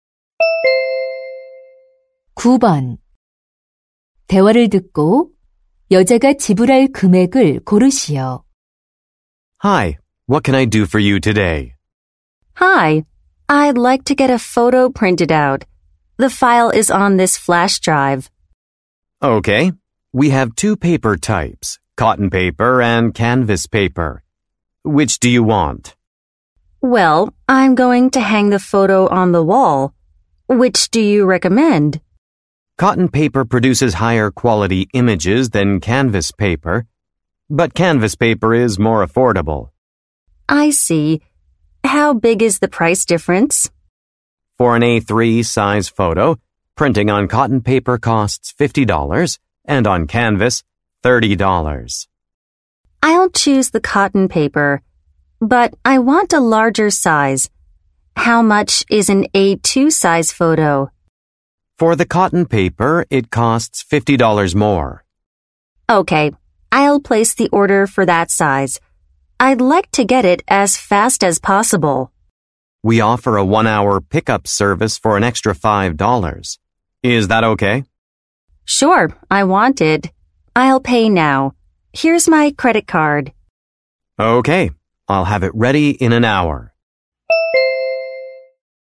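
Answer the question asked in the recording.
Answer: $105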